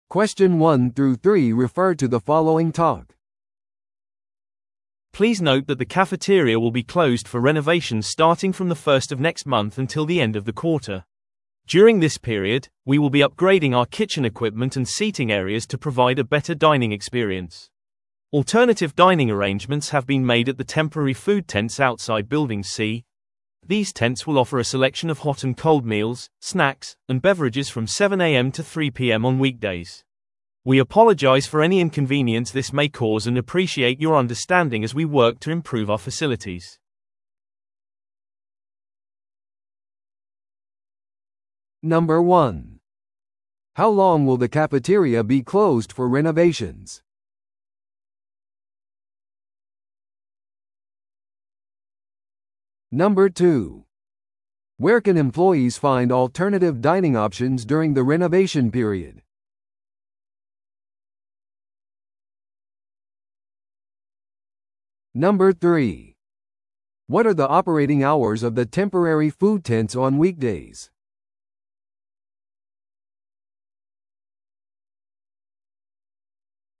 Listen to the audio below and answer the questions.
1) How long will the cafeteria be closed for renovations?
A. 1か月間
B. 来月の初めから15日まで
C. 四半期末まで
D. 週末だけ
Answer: C

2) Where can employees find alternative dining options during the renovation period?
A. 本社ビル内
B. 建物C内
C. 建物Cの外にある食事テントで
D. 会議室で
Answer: C

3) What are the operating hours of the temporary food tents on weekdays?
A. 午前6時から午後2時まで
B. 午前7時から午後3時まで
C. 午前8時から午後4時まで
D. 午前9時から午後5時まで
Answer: B

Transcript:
Please note that the cafeteria will be closed for renovations starting from the first of next month until the end of the quarter. During this period, we will be upgrading our kitchen equipment and seating areas to provide a better dining experience. Alternative dining arrangements have been made at the temporary food tents outside Building C. These tents will offer a selection of hot and cold meals, snacks, and beverages from 7am to 3pm on weekdays. We apologize for any inconvenience this may cause and appreciate your understanding as we work to improve our facilities.

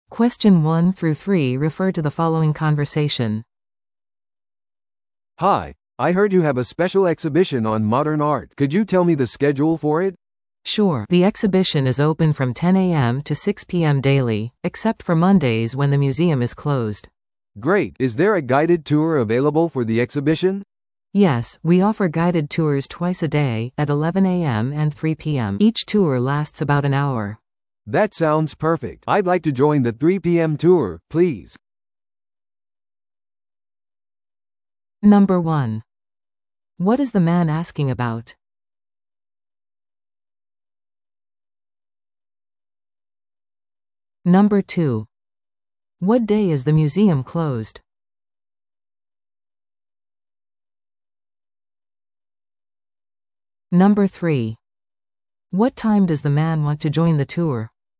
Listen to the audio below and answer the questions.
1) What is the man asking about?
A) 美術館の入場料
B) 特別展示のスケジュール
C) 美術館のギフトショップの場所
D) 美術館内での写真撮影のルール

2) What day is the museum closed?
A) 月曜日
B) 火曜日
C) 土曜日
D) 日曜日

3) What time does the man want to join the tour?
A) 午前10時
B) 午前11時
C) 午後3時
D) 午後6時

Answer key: 1B, 2A, 3C

